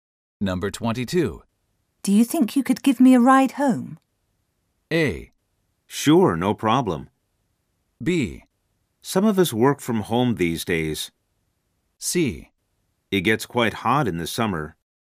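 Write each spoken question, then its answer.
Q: Do you think you could give me a ride home?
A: A: Sure, no problem.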